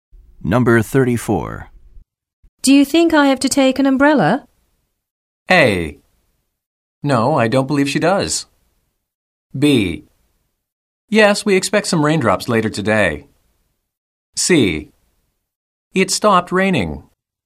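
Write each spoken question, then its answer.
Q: Do you think I have to take an umbrella?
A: B: Yes, we expect some raindrops later today.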